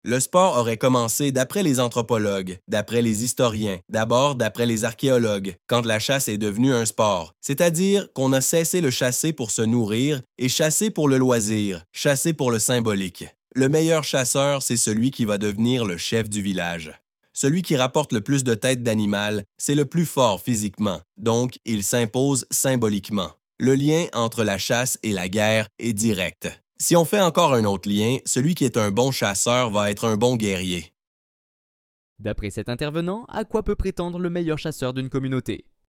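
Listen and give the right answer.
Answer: Devenir le chef du village.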